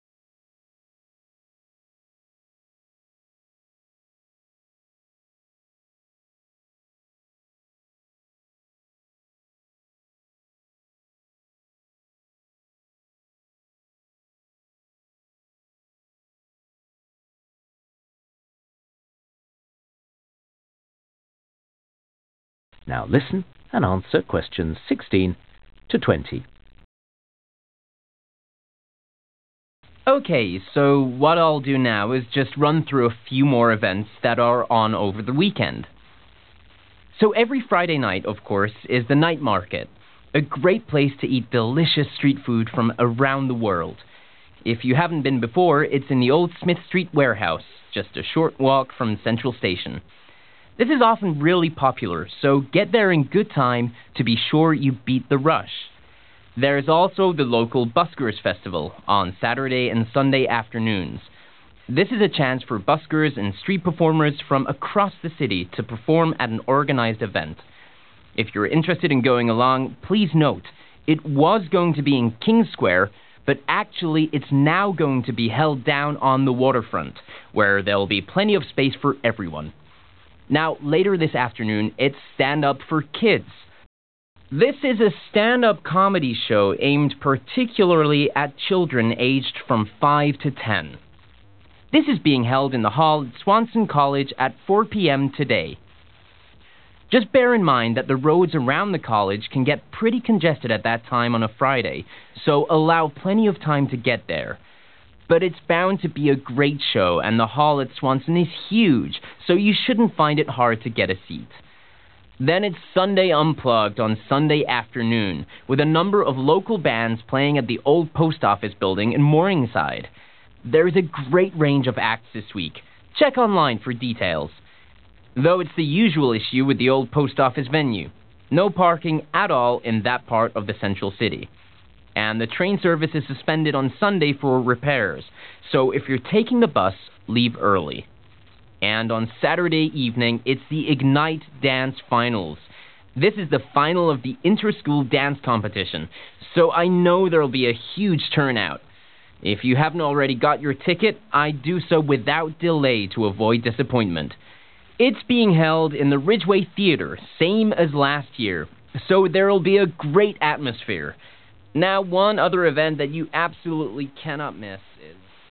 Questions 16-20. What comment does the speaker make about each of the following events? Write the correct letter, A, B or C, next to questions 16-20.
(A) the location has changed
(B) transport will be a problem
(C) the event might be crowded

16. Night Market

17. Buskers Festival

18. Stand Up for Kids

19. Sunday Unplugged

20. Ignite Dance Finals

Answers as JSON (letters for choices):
{"16": "C", "17": "A", "18": "B", "19": "B", "20": "C"}

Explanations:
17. it was going to be in King's Square, but actually it's now going to be held down on the waterfront (= changed) (=> A), where there'll be plenty of space for everyone. (lúc đầu dự kiến là nó sẽ diễn ra ở Quảng trường King, nhưng bây giờ nó sẽ được tổ chức ở bên bờ sông, nơi có đủ không gian cho tất cả mọi người.)
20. This is the final of the inter-school dance competition so I know there'll be a huge turnout (= crowded) (=> C). (Đây là vòng chung kết cuộc thi nhảy liên trường nên tôi biết sẽ có rất nhiều người tham gia)

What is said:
Dan: OK, so what I'll do now is just run through a few more events that are on over the weekend. So every Friday night, of course, is the Night Market – a great place to eat delicious street food from around the world. If you haven't been before, it's in the old Smith Street warehouse, just a short walk from Central Station. (Q16) This is often really popular so get there in good time to be sure you beat the rush.
There's also the local Buskers' Festival, on Saturday and Sunday afternoons. This is a chance for buskers and street performers from across the city to perform at an organised event. If you're interested in going along please note – (Q17) it was going to be in King's Square, but actually it's now going to be held down on the waterfront (= changed) (=> A), where there'll be plenty of space for everyone.
Now later this afternoon it's Stand Up For Kids. This is a stand-up comedy show aimed particularly at children aged from 5 to 10. This is being held in the hall at Swanson College at 4 p.m. today. But it's bound to be a great show and the hall at Swanson is huge so you shouldn't find it hard to get a seat.
Then it's Sunday Unplugged on Sunday afternoon, with a number of local bands playing at the old post office building in Morningside. There's a great range of acts this week – check online for details. And the train service is suspended on Sunday for repairs, so if you're taking the bus, leave early.
And on Saturday evening it's the Ignite Dance Finals. (Q20) This is the final of the inter-school dance competition so I know there'll be a huge turnout (= crowded) (=> C). If you haven't already got your ticket I'd do so without delay to avoid disappointment. It's being held in the Ridgeway Theatre, same as last year, so there'll be a great atmosphere.
Now one other...